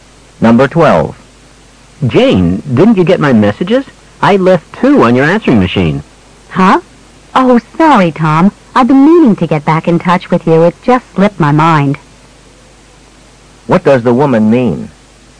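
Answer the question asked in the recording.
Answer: She forgot to call him back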